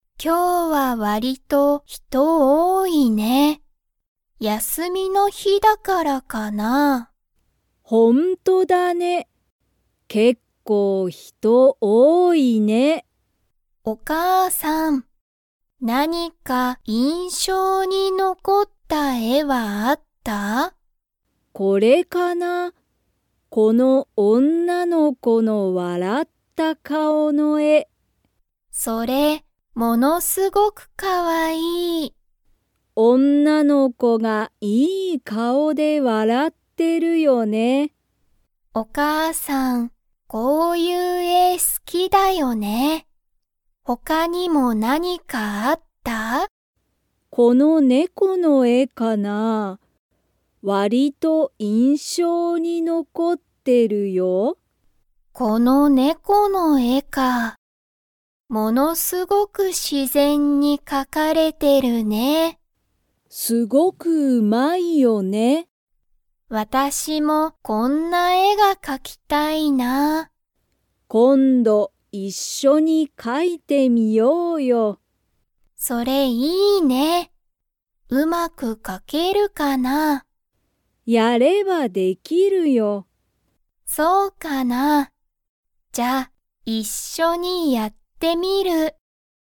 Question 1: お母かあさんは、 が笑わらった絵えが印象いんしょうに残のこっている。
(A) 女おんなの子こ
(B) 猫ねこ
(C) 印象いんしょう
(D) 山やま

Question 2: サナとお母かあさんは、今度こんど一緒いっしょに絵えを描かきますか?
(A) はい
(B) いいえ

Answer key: 1A, 2A

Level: Level 3

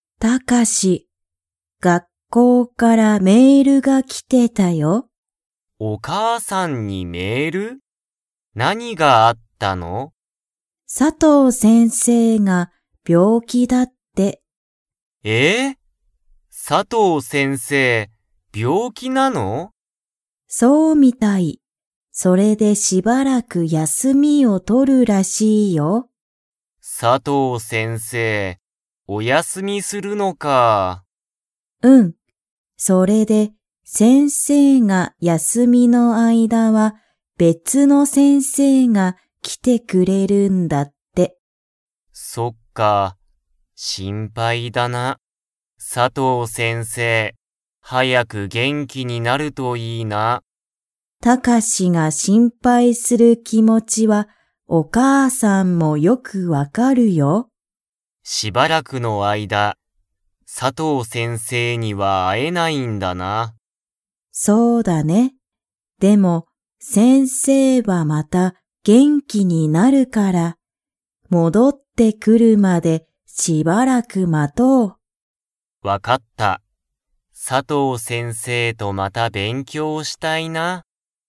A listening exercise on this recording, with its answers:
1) 佐藤さとう先生せんせいは、 でしばらく休やすみを取とる。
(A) 病気びょうき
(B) 旅行りょこう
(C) 仕事しごと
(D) 元気げんき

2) タカシは、佐藤さとう先生せんせいとまた勉強べんきょうが 。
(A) したい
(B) したくない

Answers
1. A
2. A

